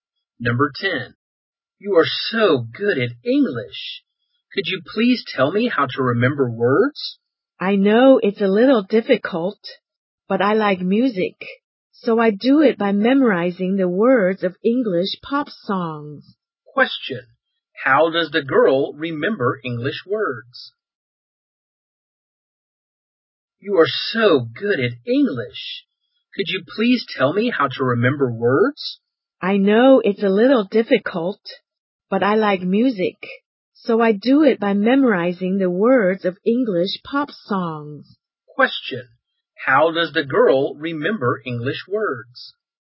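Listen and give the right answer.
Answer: By memorizing the words of English pop songs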